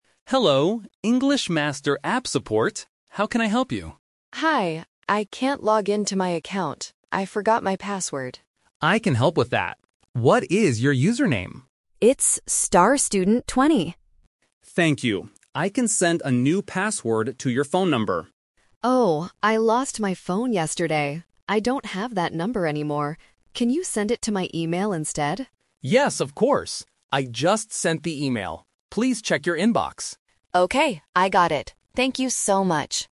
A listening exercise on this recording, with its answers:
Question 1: Why is the customer calling?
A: Because she forgot her password.

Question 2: What happened to the customer yesterday?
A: She lost her phone.

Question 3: How will the customer receive the new password?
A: By email.